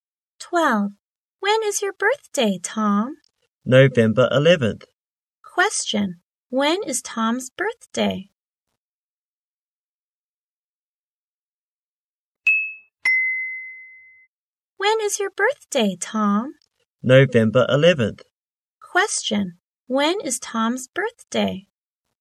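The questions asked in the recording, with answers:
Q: When is Tom's birthday?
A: November 11th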